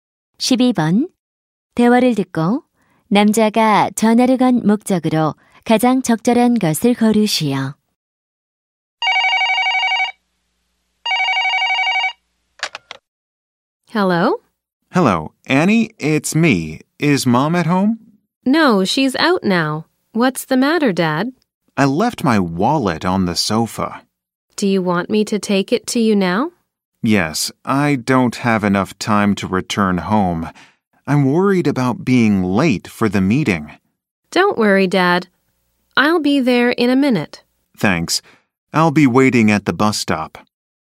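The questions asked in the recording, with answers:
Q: 대화를 듣고 남자가 전화를 건 목적으로 가장 적절한 것을 고르시오.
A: 두고 온 지갑을 가져다 달라고 부탁하려고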